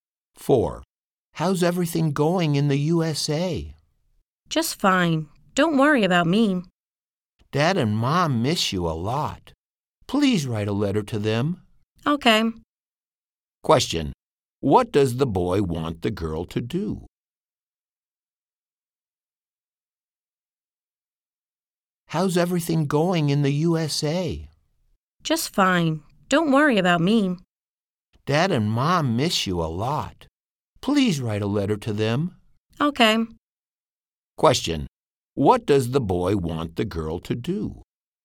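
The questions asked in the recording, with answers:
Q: Question, what does the boy want the girl to do?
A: Write a letter to Mom and Dad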